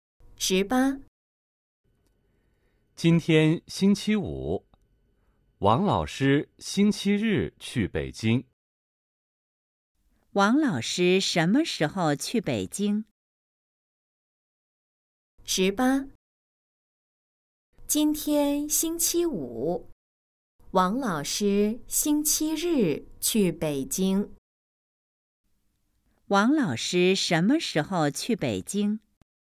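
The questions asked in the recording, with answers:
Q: 王老师什么时候去北京?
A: 星期日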